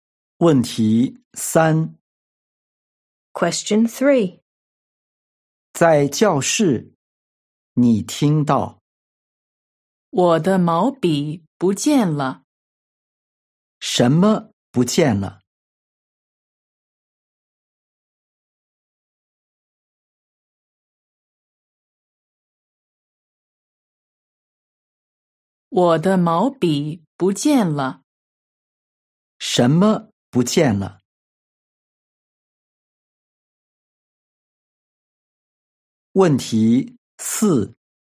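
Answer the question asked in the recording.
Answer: 毛笔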